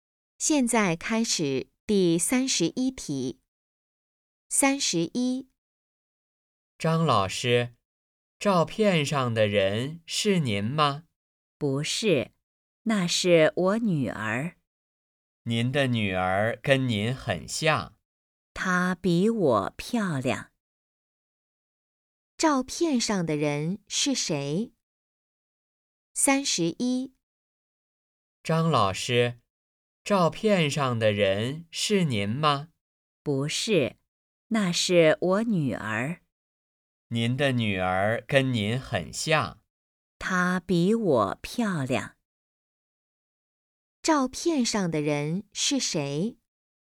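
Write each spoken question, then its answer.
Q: 照片上的人是谁?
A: 张老师的女儿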